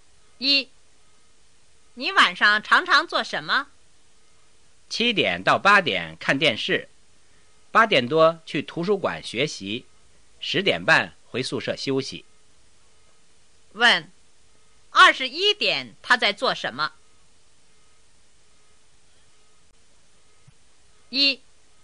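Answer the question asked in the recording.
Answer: 在图书馆学习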